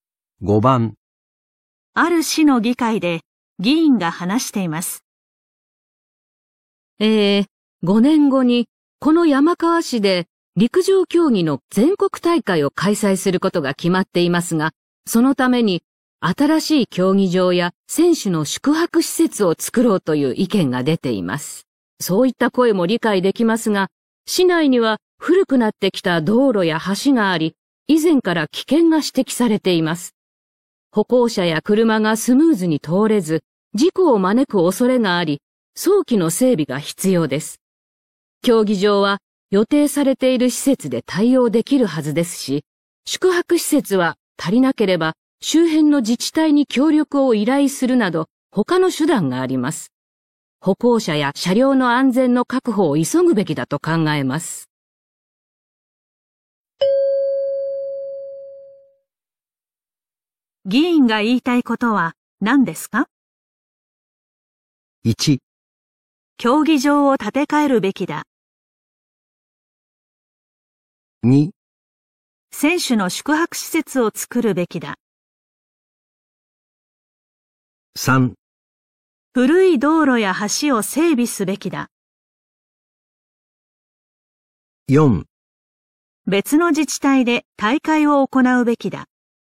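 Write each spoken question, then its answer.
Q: 議員が言いたいことは何ですか?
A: 3: 古い道路や橋を整備すべきだ。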